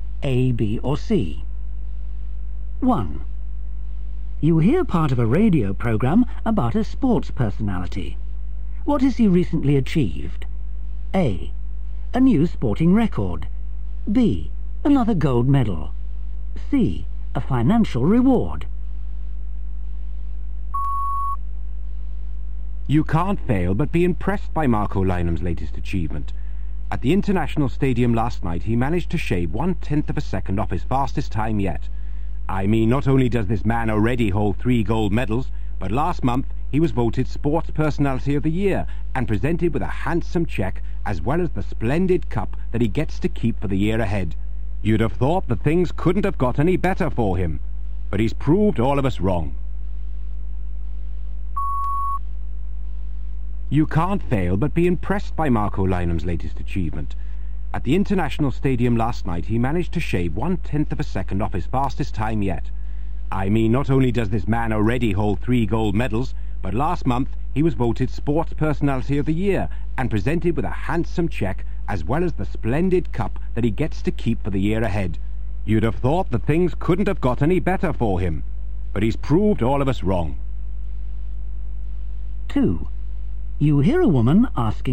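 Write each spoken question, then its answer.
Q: What has he recently achieved?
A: A: A new sporting record.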